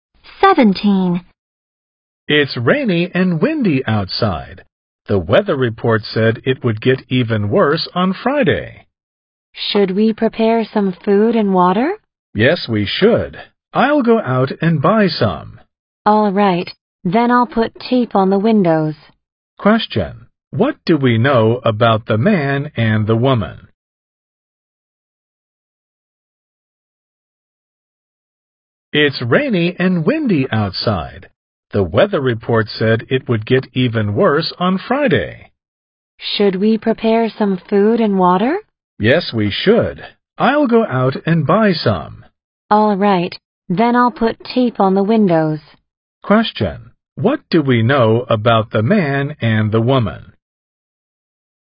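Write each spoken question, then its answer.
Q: What do we know about the man and the woman?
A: They are preparing for a storm (buying food and water, taping windows)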